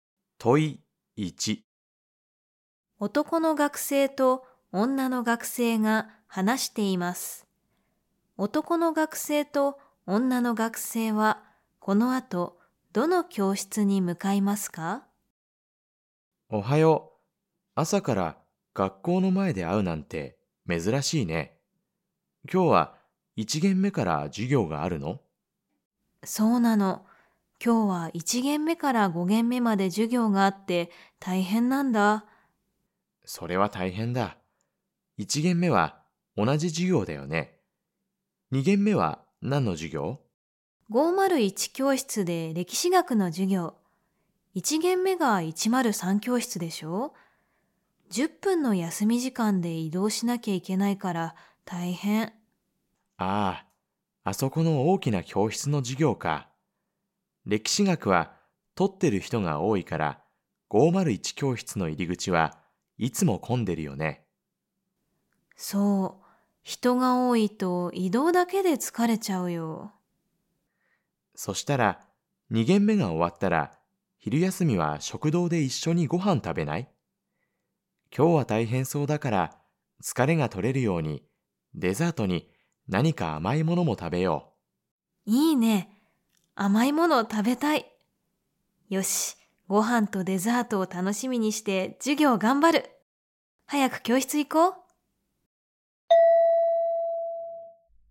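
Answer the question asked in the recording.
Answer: 103教室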